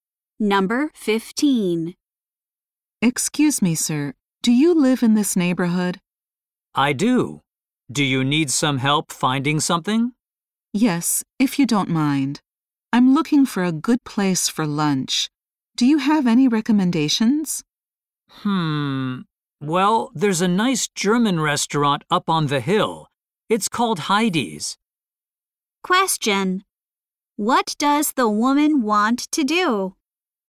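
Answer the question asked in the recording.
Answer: Find a good place for lunch.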